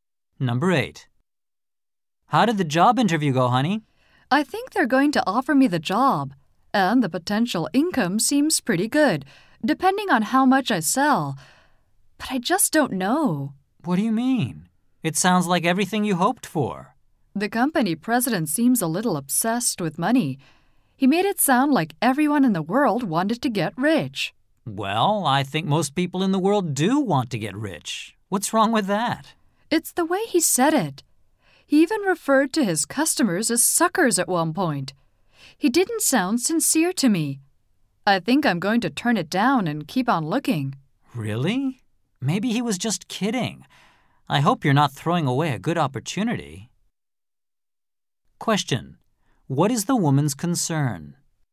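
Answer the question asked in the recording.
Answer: That the man may be turning down a good job opportunity.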